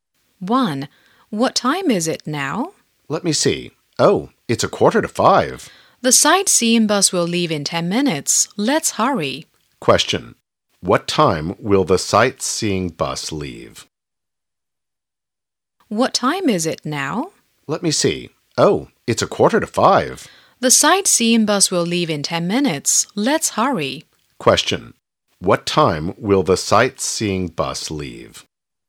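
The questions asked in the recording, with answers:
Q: What time will the sightseeing bus leave?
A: At 4:55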